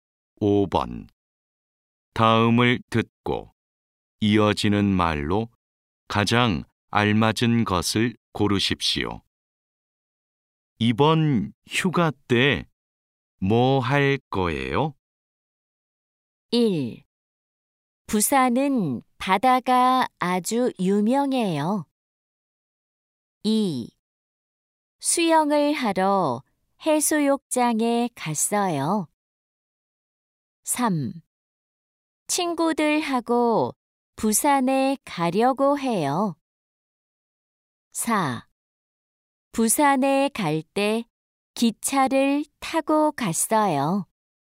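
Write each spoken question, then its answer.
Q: 이번 휴가 때 뭐 할 거예요?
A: 3: 친구들하고 부산에 가려고 해요.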